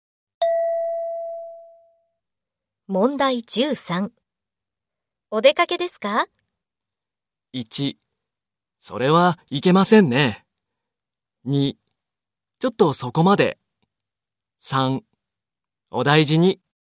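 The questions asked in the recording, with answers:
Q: お出かけですか?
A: 2: ちょっとそこまで。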